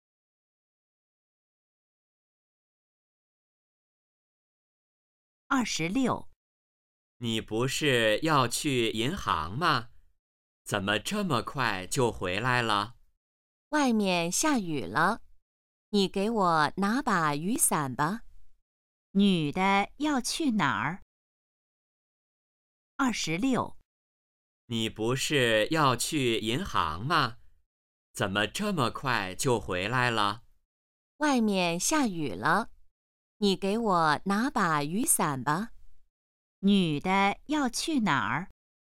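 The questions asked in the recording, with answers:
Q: 女的要去哪儿?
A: 银行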